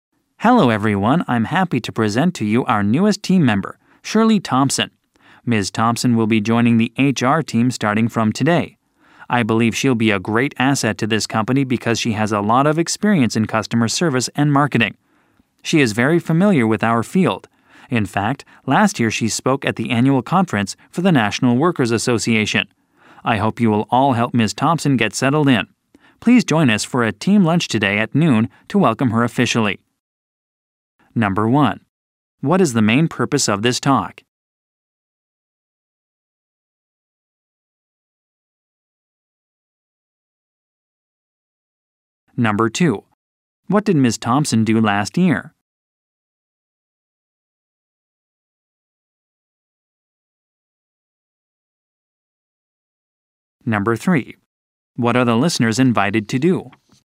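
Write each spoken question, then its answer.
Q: What is the main purpose of this talk?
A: To introduce a new team member, Shirley Thompson

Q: What did Ms. Thompson do last year?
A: She spoke at the annual conference for the National Workers Association

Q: What are the listeners invited to do?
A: Join a team lunch today at noon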